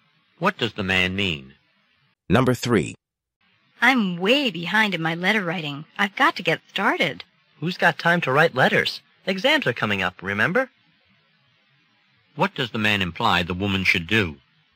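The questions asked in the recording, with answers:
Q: What does the man imply the woman should do?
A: Study for exams instead of writing letters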